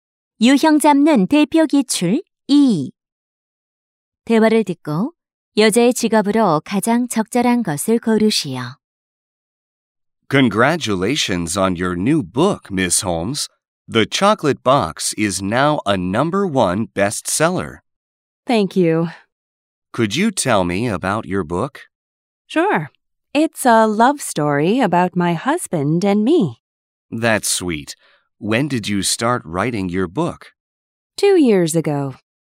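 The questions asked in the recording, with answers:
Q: 대화를 듣고 여자의 직업으로 가장 적절한 것을 고르시오.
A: 작가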